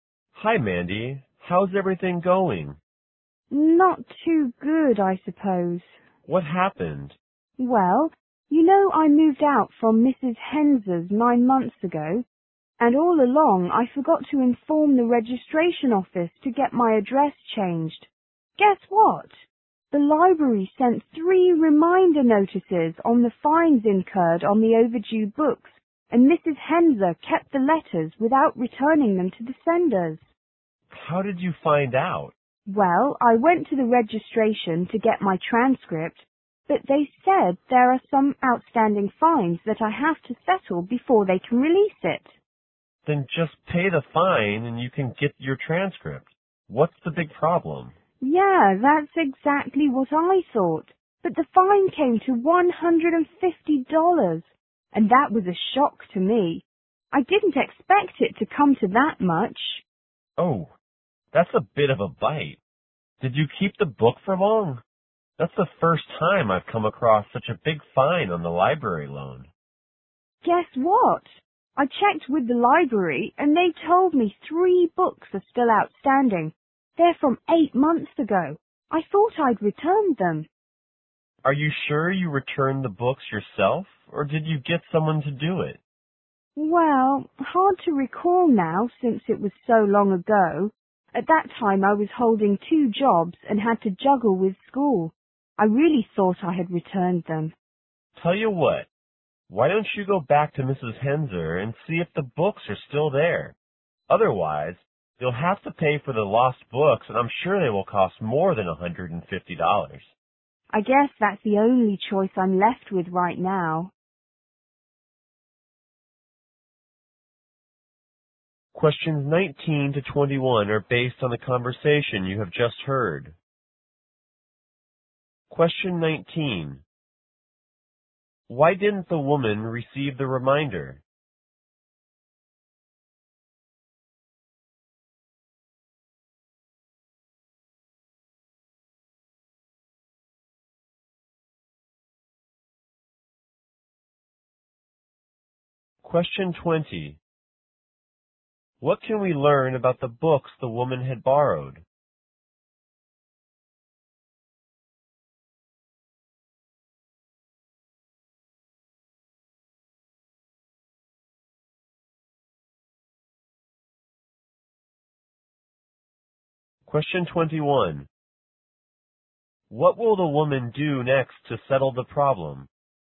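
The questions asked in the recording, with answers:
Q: Why didn't the woman receive the reminder?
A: She had moved and didn't tell the registration office her new address, and Mrs. Henser kept the letters.

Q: What can we learn about the books the woman had borrowed?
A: Three books have been overdue for 8 months.

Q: What will the woman do next to settle the problem?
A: Go back to Mrs. Henser's and see if the books are still there.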